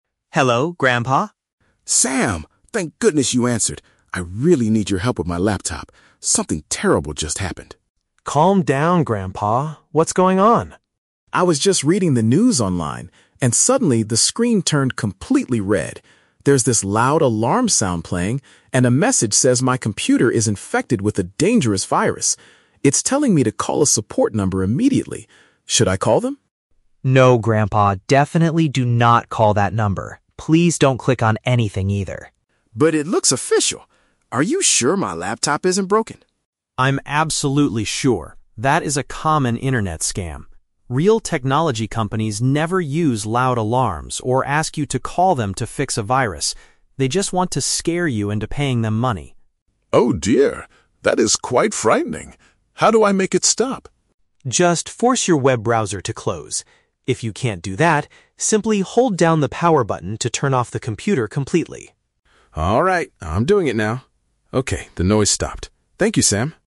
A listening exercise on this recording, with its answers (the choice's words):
Listen to the telephone conversation between Sam and his grandfather. Choose the correct answer (A, B, or C) for each question.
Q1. What caused the grandfather to panic?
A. He dropped his laptop and broke the screen.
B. He heard a loud noise and saw a threat on his screen.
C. He received a scary phone call from a stranger.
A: He heard a loud noise and saw a threat on his screen.

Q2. How does Sam know the virus warning is fake?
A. Because the grandfather's computer is not connected to the internet.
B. Because he knows the grandfather does not have any money to pay.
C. Because genuine technology businesses do not act like that.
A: Because genuine technology businesses do not act like that.

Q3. What is Sam's instruction to solve the problem?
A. To shut down the internet program or the device.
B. To call the support team using his mobile phone.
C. To pay a small fee to the company to remove the virus.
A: To shut down the internet program or the device.

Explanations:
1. The grandfather says, "the screen turned completely red. There's this loud alarm sound playing, and a message says my computer is infected." This perfectly matches hearing a "loud noise" and seeing a "threat". Why the traps are wrong: Option A is incorrect because the grandfather asks "Are you sure my laptop isn't broken?", but he didn't physically drop it. Option C is a trap; the message told him to call a number, but nobody called him on the phone.
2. Sam says, "Real technology companies never use loud alarms or ask you to call them to fix a virus." "Genuine technology businesses" is a paraphrase of "Real technology companies", and "do not act like that" summarizes their behavior. Why the traps are wrong: Option A is wrong because the grandfather was "reading the news online" (he had internet). Option B is not mentioned; Sam only says the scammers "want to scare you into paying them money."
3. Sam tells his grandfather to "force your web browser to close" or "turn off the computer completely." This means shutting down the internet program (browser) or the device (computer). Why the traps are wrong: Options B and C are exactly what the scammers want the grandfather to do, and Sam explicitly tells him NOT to do these things ("definitely do not call that number", "they want to scare you into paying").

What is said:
Sam: Hello, Grandpa?
Grandpa: Sam! Thank goodness you answered. I really need your help with my laptop. Something terrible just happened.
Sam: Calm down, Grandpa. What's going on?
Grandpa: I was just reading the news online, and suddenly, the screen turned completely red. There's this loud alarm sound playing, and a message says my computer is infected with a dangerous virus. It's telling me to call a support number immediately. Should I call them?
Sam: No, Grandpa, definitely do not call that number! Please don't click on anything either.
Grandpa: But it looks official! Are you sure my laptop isn't broken?
Sam: I'm absolutely sure. That is a common internet scam. Real technology companies never use loud alarms or ask you to call them to fix a virus. They just want to scare you into paying them money.
Grandpa: Oh, dear. That is quite frightening. How do I make it stop?
Sam: Just force your web browser to close. If you can't do that, simply hold down the power button to turn off the computer completely.